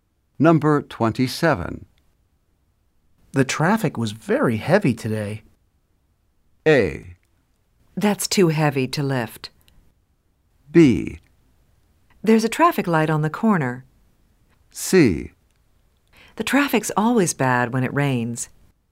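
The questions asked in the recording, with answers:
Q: The traffic was very heavy today.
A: C: The traffic's always bad when it rains.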